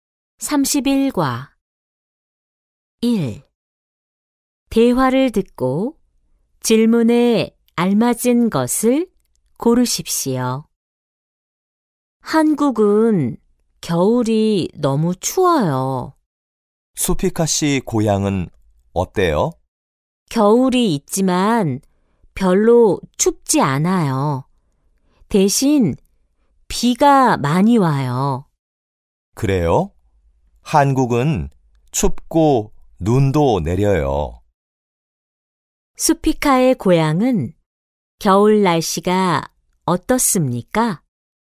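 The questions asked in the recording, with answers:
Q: 수피카의 고향은 겨울 날씨가 어떻습니까?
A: 별로 춥지 않고 비가 많이 와요.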